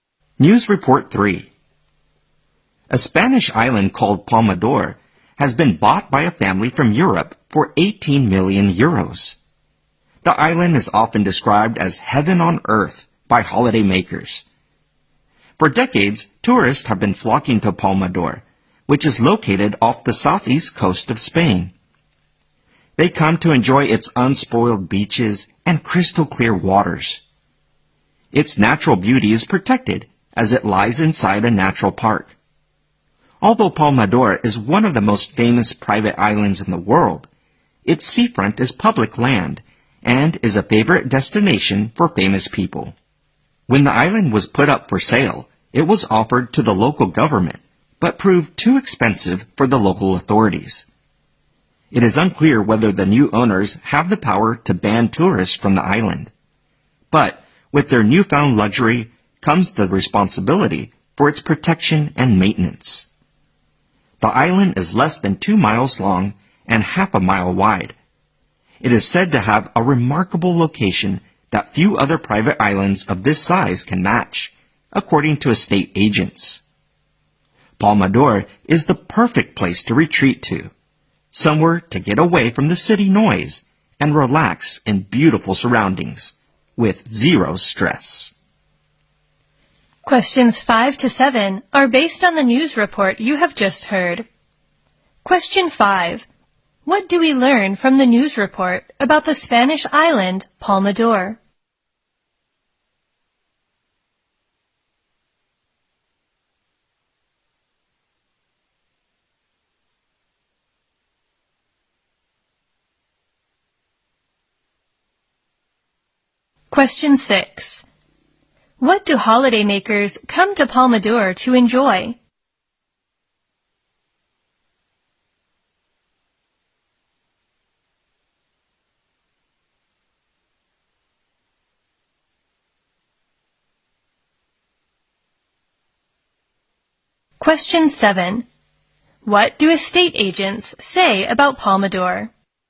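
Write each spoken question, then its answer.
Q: What do holidaymakers come to Palmadora to enjoy?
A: Its unspoiled beaches and crystal clear waters

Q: What do estate agents say about Palmadora?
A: It has a remarkable location that few private islands of its size can match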